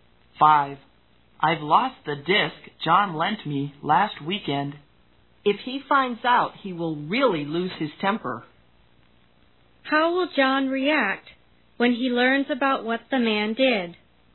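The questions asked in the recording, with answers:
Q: How will John react when he learns about what the man did?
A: He will get very angry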